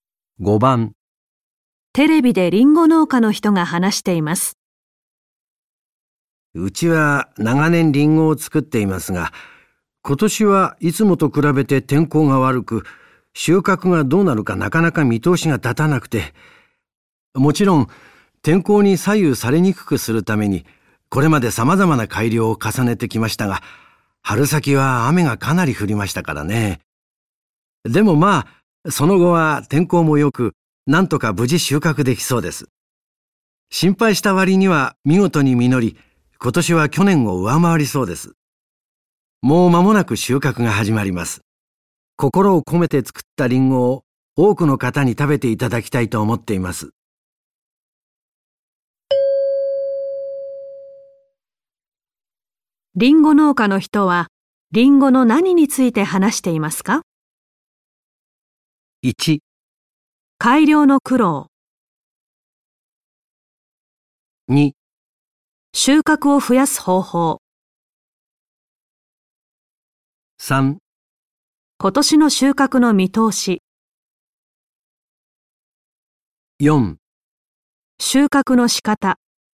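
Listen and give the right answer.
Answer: 3: 今年の収穫の見通し。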